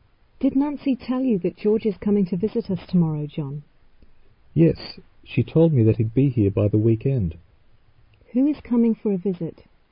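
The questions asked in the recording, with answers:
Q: Who is coming for a visit?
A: George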